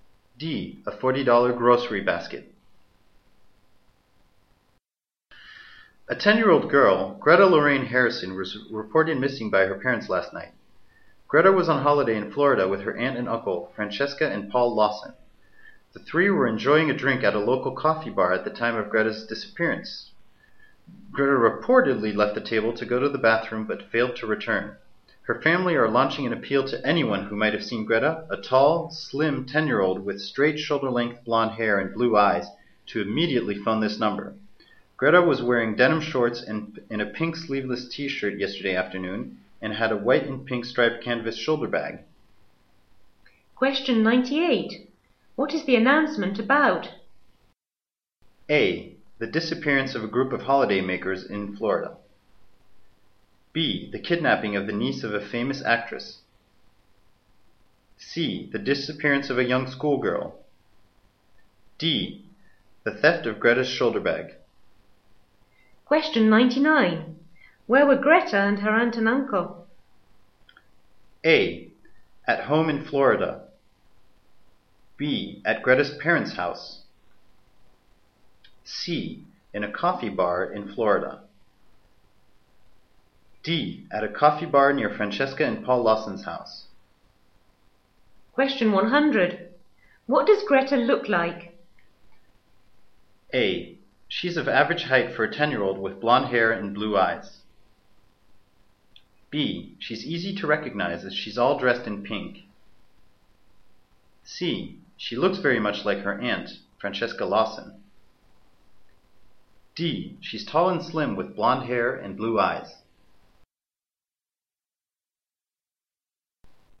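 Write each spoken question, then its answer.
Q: What is the announcement about?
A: C: The disappearance of a young schoolgirl.

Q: Where were Greta and her aunt and uncle?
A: C: In a coffee bar in Florida.

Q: What does Greta look like?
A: D: She's tall and slim with blonde hair and blue eyes.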